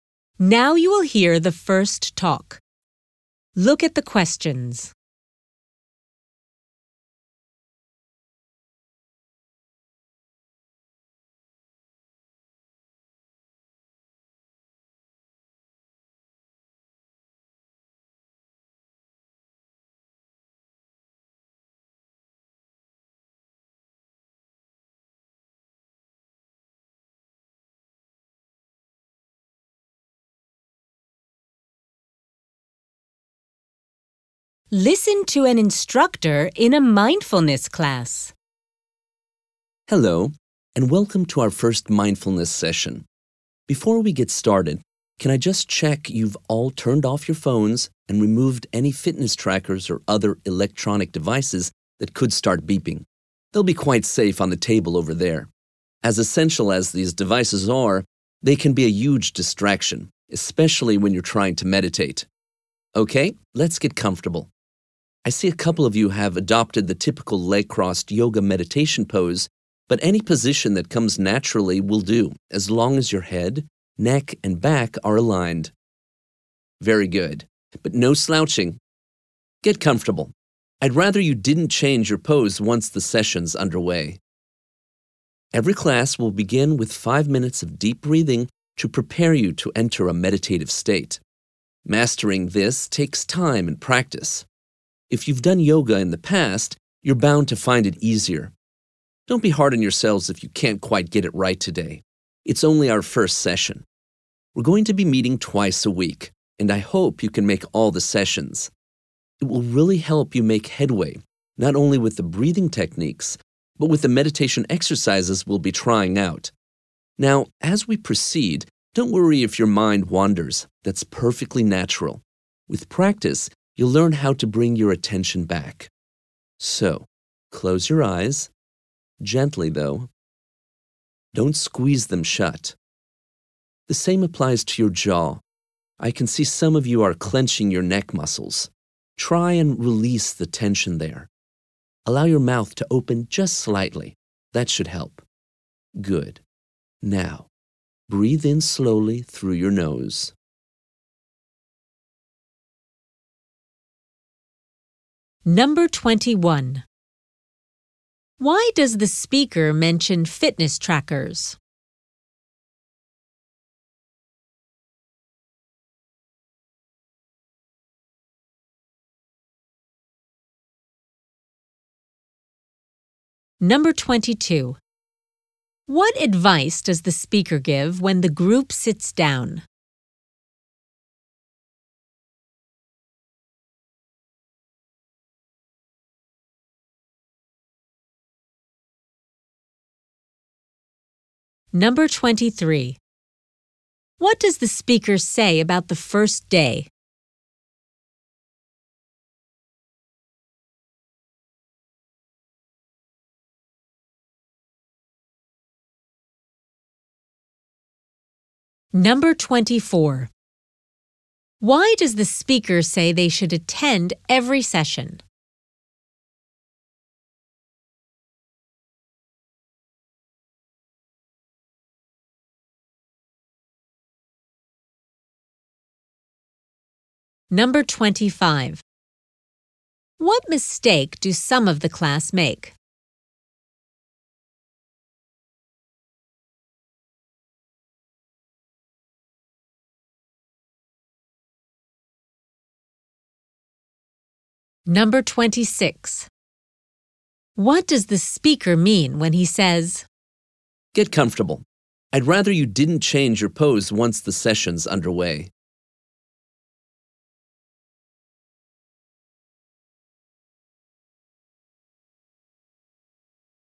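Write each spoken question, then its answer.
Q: Why does the speaker mention fitness trackers?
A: They could beep and distract people, so they should be removed

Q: What advice does the speaker give when the group sits down?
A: Sit in any natural position with head, neck and back aligned, without slouching

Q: What does the speaker say about the first day?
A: Don't be hard on yourselves if you can't get the breathing right

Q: Why does the speaker say they should attend every session?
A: It will help them make progress

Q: What mistake do some of the class make?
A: They clench their neck muscles

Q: What does the speaker mean when he says,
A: They should settle into a position they can keep for the whole session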